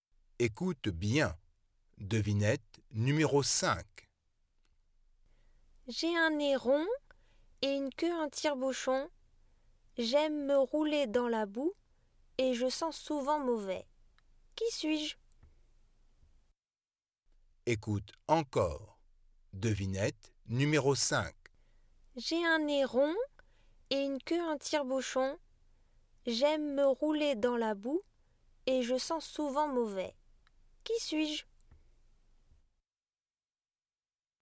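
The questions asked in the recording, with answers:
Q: Qui suis-je?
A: un cochon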